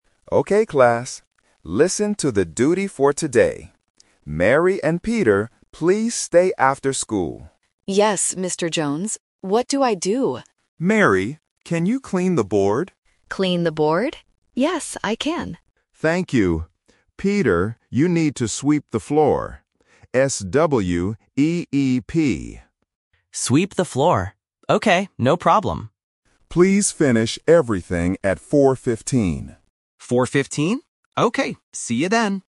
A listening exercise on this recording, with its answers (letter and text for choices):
Listen to the conversation and choose the correct answer (A, B, or C).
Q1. Who will clean the board?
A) Peter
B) Mary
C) Mr. Jones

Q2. What word does the teacher spell?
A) B-O-A-R-D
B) C-L-E-A-N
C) S-W-E-E-P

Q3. What time should the students finish their work?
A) 4:15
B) 4:50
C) 5:15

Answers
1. B) Mary
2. C) S-W-E-E-P
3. A) 4:15

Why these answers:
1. The teacher says, "Mary, can you clean the board?" and she agrees. Why the trap is wrong: Peter (A) is the other student, but his job is sweeping. Mr. Jones (C) is the teacher who gives the orders.
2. The teacher spells the action for Peter: "S-W-E-E-P." Why the trap is wrong: Board (A) and Clean (B) are words used in the script, but the teacher does not spell them.
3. The teacher tells the students to finish at 4:15. Why the trap is wrong: 4:50 (B) is a sound trap because "fifteen" and "fifty" sound very similar in English. 5:15 (C) is not mentioned.

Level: A1